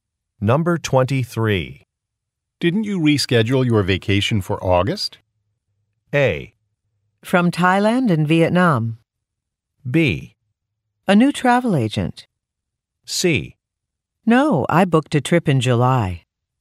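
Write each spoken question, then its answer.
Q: Didn't you reschedule your vacation for August?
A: C: No, I booked a trip in July.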